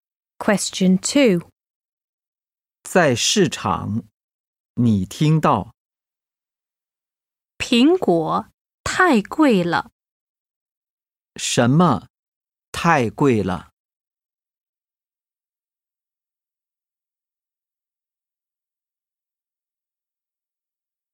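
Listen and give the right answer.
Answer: 苹果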